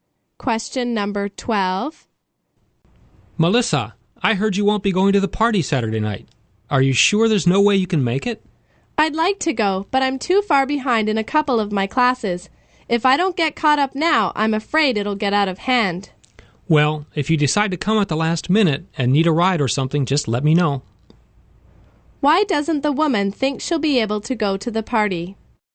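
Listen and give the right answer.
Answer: She needs to catch up in some of her classes.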